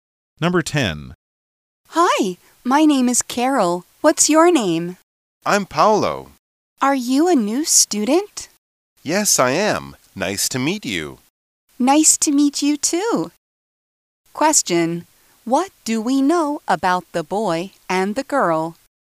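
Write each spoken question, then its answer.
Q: What do we know about the boy and the girl?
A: They are meeting for the first time; the boy, Paolo, is a new student.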